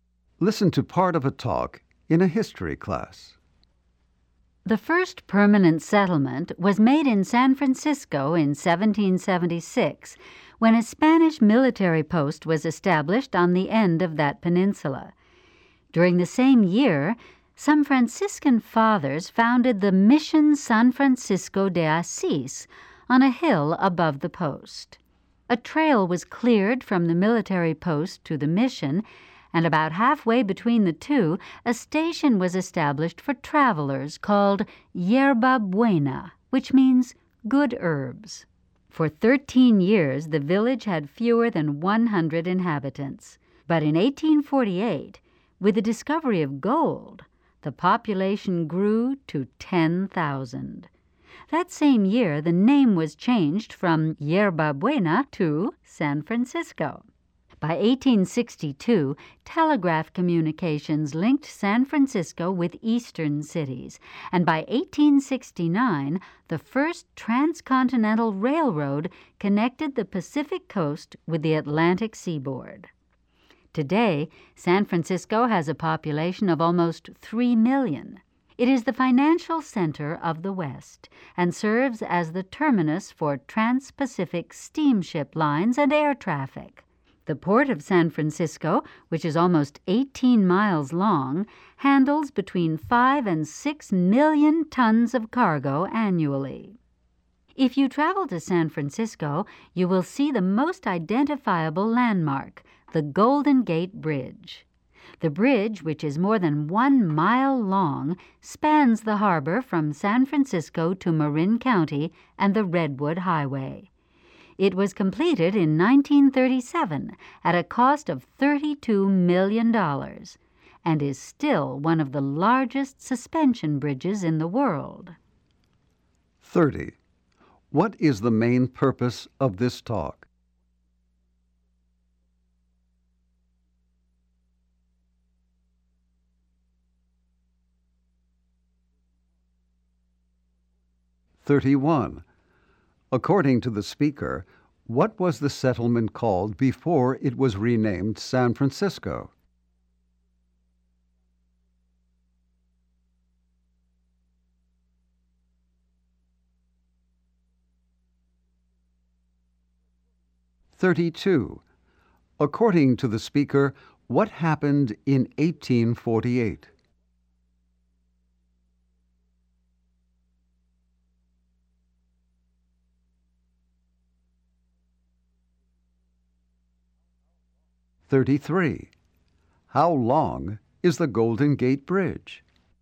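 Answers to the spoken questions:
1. To give a brief history of San Francisco
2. Yerba Buena
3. Gold was discovered and the population grew to 10,000
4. More than 1 mile long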